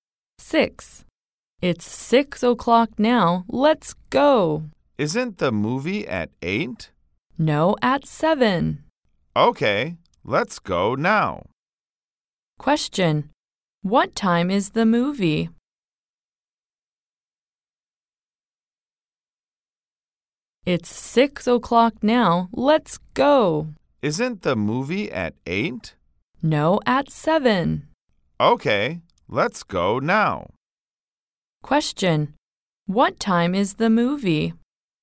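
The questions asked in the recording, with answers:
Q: What time is the movie?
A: 7 o'clock.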